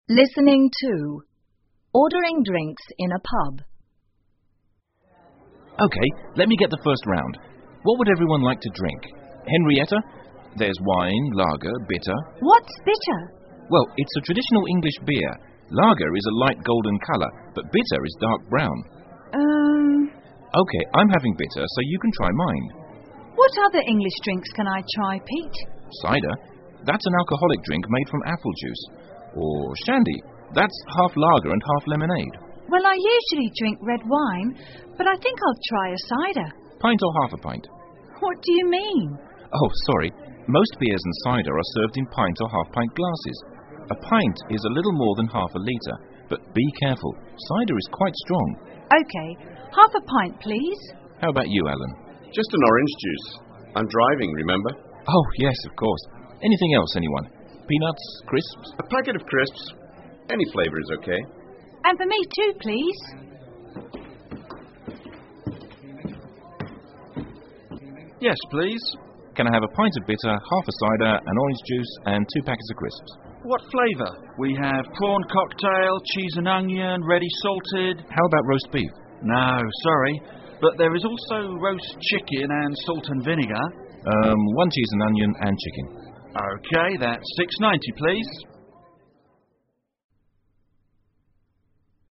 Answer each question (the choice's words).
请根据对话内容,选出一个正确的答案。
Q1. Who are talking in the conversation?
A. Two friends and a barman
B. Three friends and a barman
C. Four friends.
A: Three friends and a barman

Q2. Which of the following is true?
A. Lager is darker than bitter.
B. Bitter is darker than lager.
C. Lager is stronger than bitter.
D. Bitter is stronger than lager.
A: Bitter is darker than lager.

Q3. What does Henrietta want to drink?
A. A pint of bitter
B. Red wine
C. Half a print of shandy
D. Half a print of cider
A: Half a print of cider

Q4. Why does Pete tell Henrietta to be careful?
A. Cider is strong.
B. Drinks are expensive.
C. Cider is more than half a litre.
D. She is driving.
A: Cider is strong.

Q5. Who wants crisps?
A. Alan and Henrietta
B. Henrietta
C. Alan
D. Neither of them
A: Alan and Henrietta

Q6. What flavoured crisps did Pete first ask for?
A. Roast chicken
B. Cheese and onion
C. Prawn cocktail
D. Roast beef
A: Roast beef

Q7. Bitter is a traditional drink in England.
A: T

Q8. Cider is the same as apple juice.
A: F

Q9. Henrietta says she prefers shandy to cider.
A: F

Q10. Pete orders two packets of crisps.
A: T

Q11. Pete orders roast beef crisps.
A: F

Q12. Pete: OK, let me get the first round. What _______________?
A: would everyone like to drink

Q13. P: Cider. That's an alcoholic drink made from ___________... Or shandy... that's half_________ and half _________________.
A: apple juice,lager,lemonade

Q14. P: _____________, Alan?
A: How about you,driving